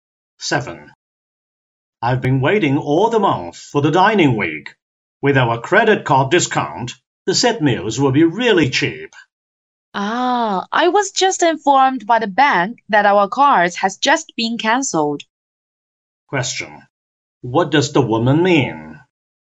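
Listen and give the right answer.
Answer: They can't get the credit card discount because their cards were cancelled.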